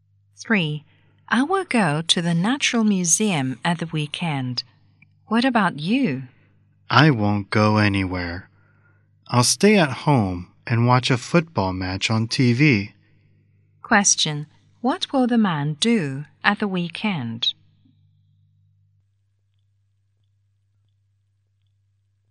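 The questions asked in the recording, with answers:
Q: What will the man do at the weekend?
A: Stay at home and watch a football match on TV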